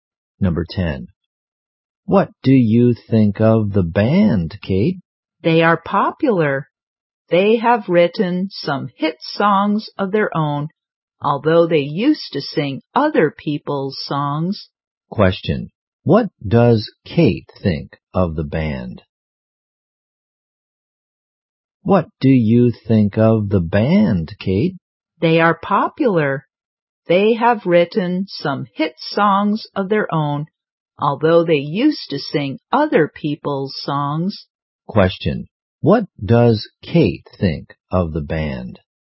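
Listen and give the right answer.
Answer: They are popular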